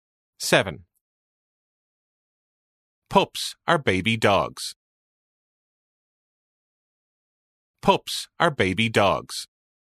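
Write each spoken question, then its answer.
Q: Pups are baby dogs.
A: True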